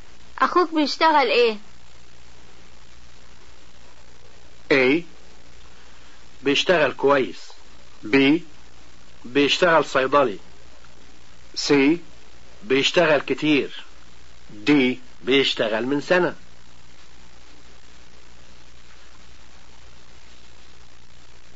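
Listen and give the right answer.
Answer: B: بيشتغل صيدلي.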